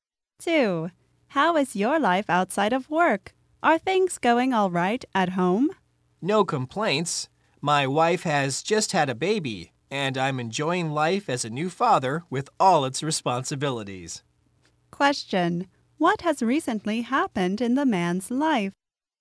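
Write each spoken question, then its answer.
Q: what has recently happened in the man's life?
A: His wife has just had a baby; he became a father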